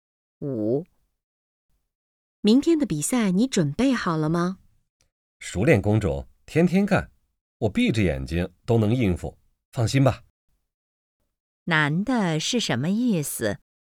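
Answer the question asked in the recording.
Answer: 很有把握,比赛很容易应付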